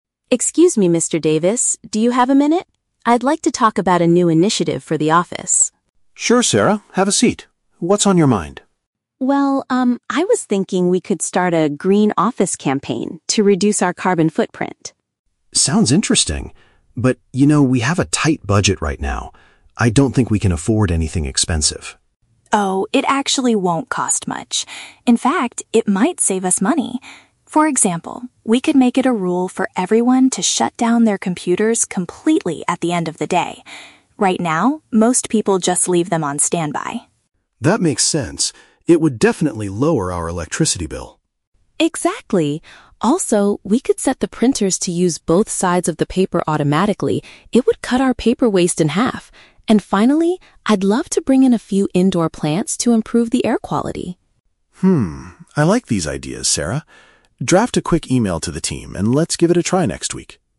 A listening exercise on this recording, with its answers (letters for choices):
Listen to a conversation between an employee and her manager. Choose the correct answer (A, B, or C) for each question.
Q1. What is Sarah's main goal for the meeting?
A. To ask the company to pay for her new computer.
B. To suggest ways the company can be more eco-friendly.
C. To complain about the office's high electricity bills.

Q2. What does Sarah suggest doing with the office computers?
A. Replacing the old ones with energy-saving models.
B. Putting them on standby during the lunch break.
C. Turning them off entirely before leaving work.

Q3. How does Mr. Davis react to Sarah's proposals?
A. He agrees to implement the ideas because they are cost-effective.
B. He rejects them because the company has a very tight budget.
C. He asks her to buy the indoor plants with her own money.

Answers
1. B
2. C
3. A

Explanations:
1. Sarah wants to start a "Green Office campaign" to "reduce our carbon footprint." (Paraphrasing: eco-friendly = Green Office / reduce carbon footprint). Why the trap is wrong: Option (C) is a trap. The electricity bill is mentioned by Mr. Davis as a benefit of the plan, not as a complaint from Sarah. Option (A) uses the word "computer" which appears in the audio, but she doesn't want a new one.
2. Sarah suggests making a rule for everyone to "shut down their computers completely at the end of the day." (Paraphrasing: Turning them off entirely = shut down completely; before leaving work = at the end of the day). Why the trap is wrong: Option (B) is the trap. The word "standby" is mentioned, but Sarah complains that people leave them on standby, which is a bad habit she wants to stop. Option (A) is not mentioned.
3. At the end, Mr. Davis says, "I like these ideas... let's give it a try next week." Earlier, he realizes the computer rule will "lower our electricity bill," meaning it saves money (cost-effective). Why the trap is wrong: Option (B) is a very strong trap. Mr. Davis does mention having a "tight budget" at the beginning, but Sarah convinces him that the ideas won't cost much and will save money, so he changes his mind. Option (C) is unmentioned.

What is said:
Sarah: Excuse me, Mr. Davis. Do you have a minute? I'd like to talk about a new initiative for the office.
Mr. Davis: Sure, Sarah. Have a seat. What's on your mind?
Sarah: Well, um, I was thinking we could start a "Green Office" campaign to reduce our carbon footprint.
Mr. Davis: Sounds interesting. But, you know, we have a tight budget right now. I don't think we can afford anything expensive.
Sarah: Oh, it actually won't cost much. In fact, it might save us money. For example, we could make it a rule for everyone to shut down their computers completely at the end of the day. Right now, most people just leave them on standby.
Mr. Davis: That makes sense. It would definitely lower our electricity bill.
Sarah: Exactly. Also, we could set the printers to use both sides of the paper automatically. It would cut our paper waste in half. And finally, I'd love to bring in a few indoor plants to improve the air quality.
Mr. I like these ideas, Sarah. Draft a quick email to the team, and let's give it a try next week.